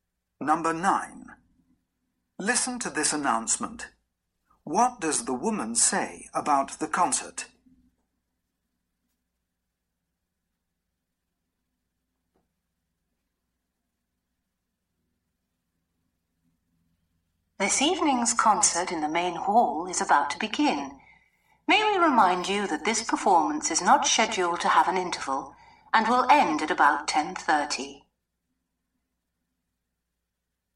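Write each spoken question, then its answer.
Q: What does the woman say about the concert?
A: It has no interval and will end at about 10:30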